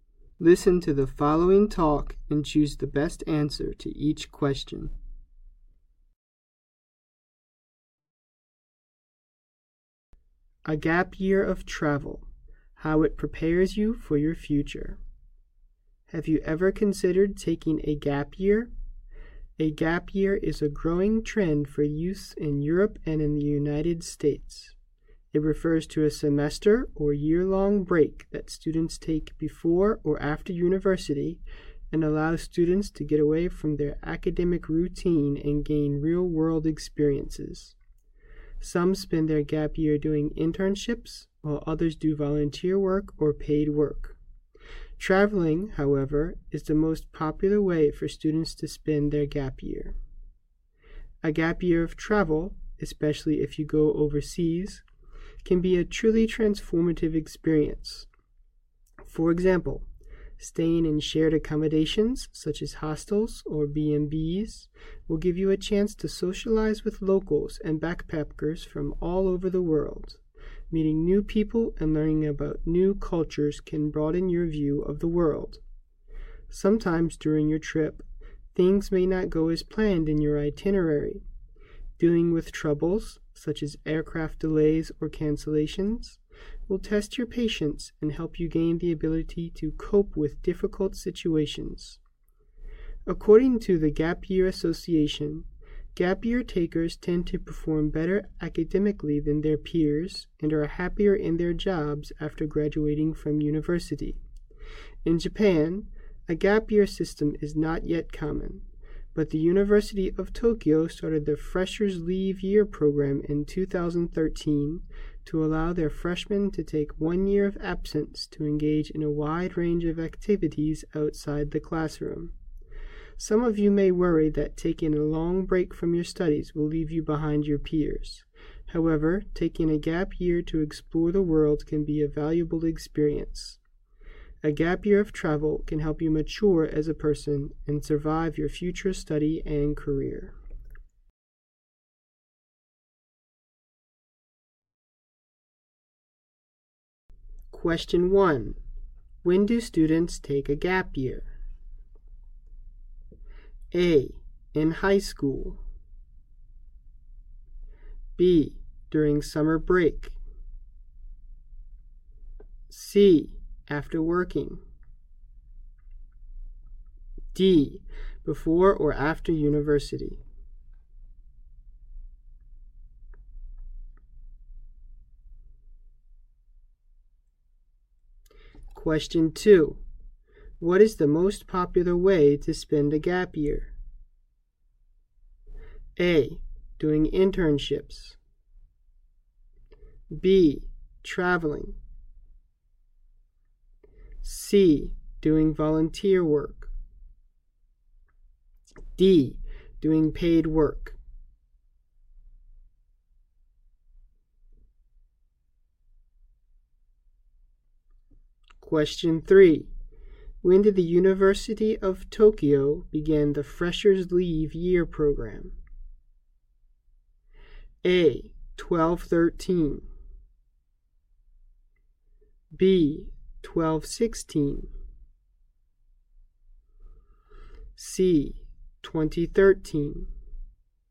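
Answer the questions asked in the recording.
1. D: Before or after university.
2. B: Traveling.
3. C: 2013.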